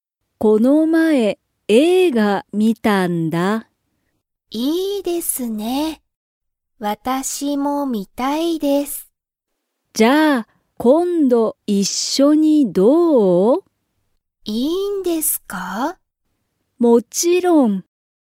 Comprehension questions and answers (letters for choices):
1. ゆみも映画(えいが)を観(み)たいですか?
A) はい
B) いいえ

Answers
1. A

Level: Level 1